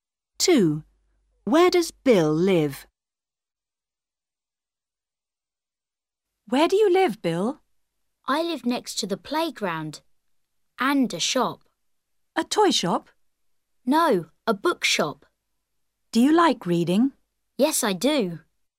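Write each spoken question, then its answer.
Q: Where does Bill live?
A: Next to the playground and a bookshop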